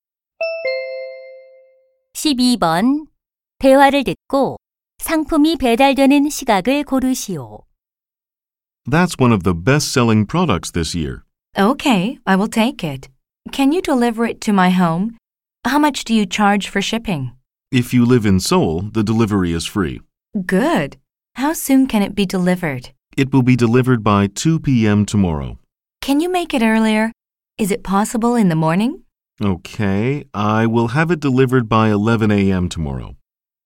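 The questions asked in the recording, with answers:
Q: 대화를 듣고 상품이 배달되는 시각을 고르시오.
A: 내일 오전 11시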